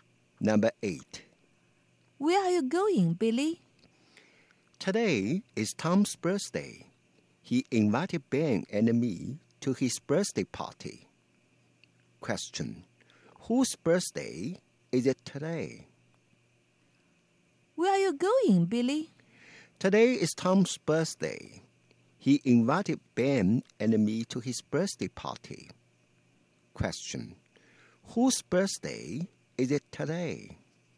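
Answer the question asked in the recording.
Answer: Tom's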